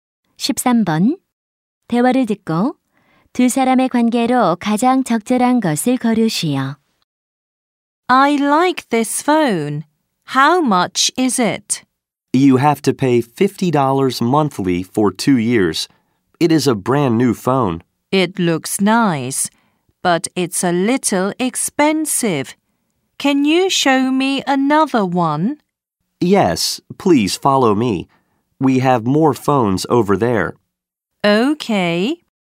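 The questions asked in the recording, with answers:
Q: 대화를 듣고 두 사람의 관계로 가장 적절한 것을 고르시오.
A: 휴대전화 판매원과 손님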